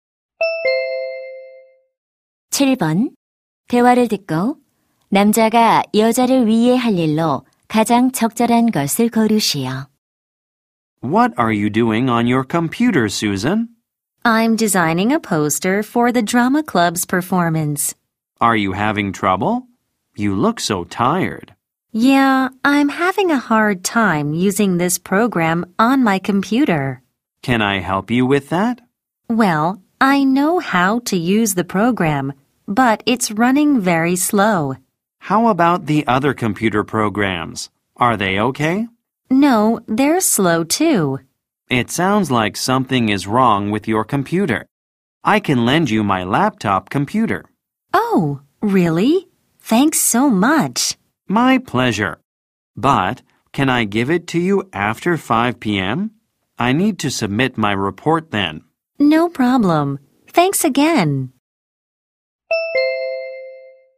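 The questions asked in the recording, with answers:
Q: 대화를 듣고 남자가 여자를 위해 할 일로 가장 적절한 것을 고르시오.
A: 노트북 컴퓨터 빌려주기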